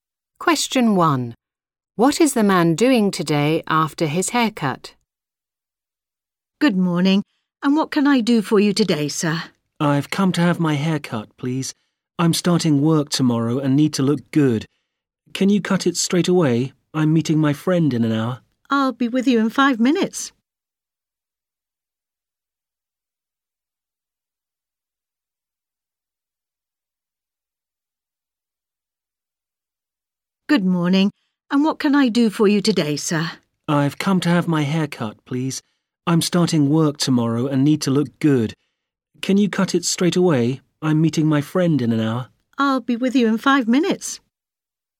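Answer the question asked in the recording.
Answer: meeting his friend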